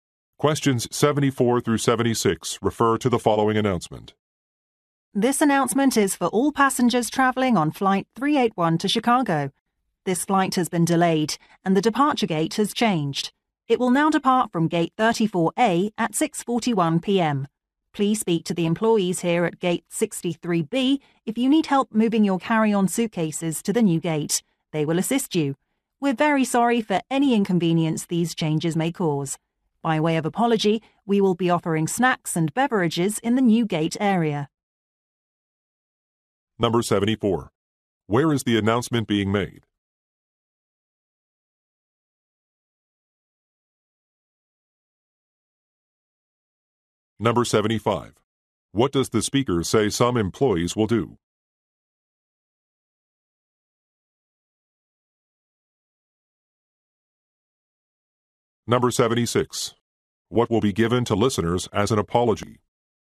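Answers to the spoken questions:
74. At an airport gate (gate 63B)
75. Help move carry-on suitcases to the new gate
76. Snacks and beverages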